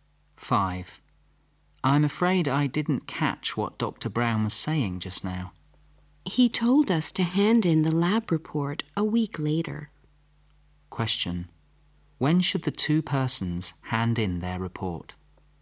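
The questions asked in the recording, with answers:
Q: When should the 2 persons hand in their report?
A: A week later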